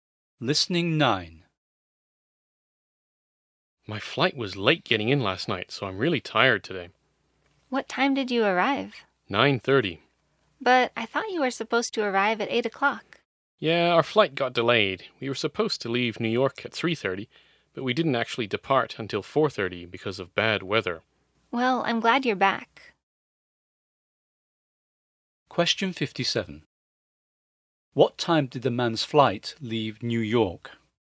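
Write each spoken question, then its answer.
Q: What time did the man's flight leave New York?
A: 4:30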